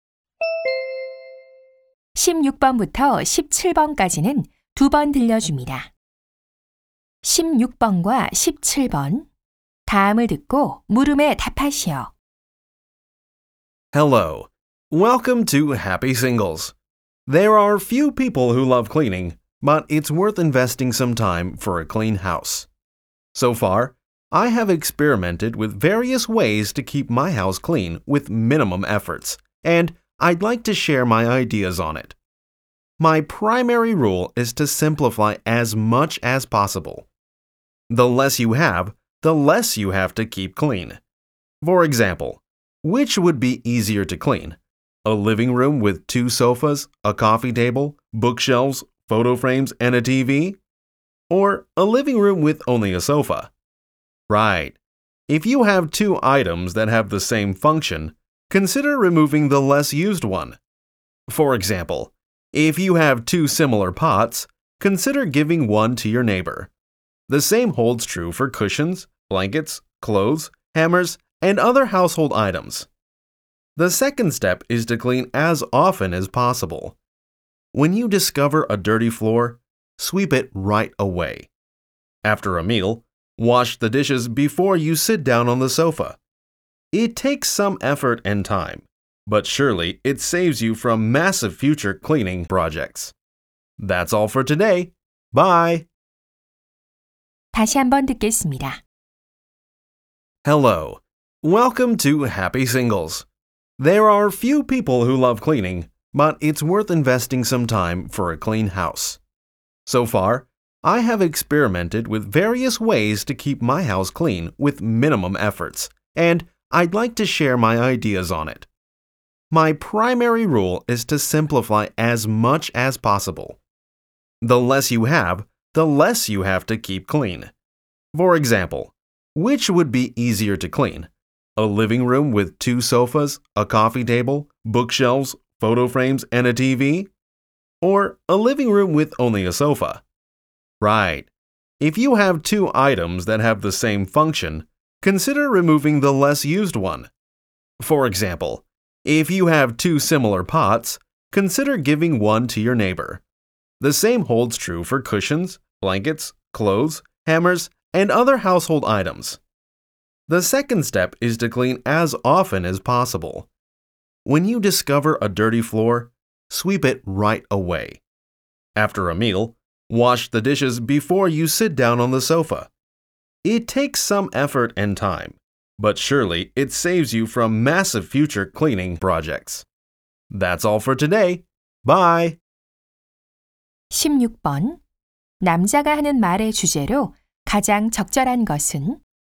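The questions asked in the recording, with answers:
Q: 16번 남자가 하는 말의 주제로 가장 적절한 것은?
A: 최소한의 노력으로 집을 깨끗하게 유지하는 방법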